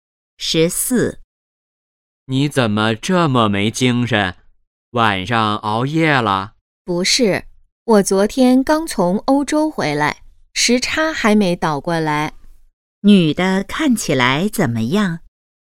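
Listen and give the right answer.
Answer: 没精神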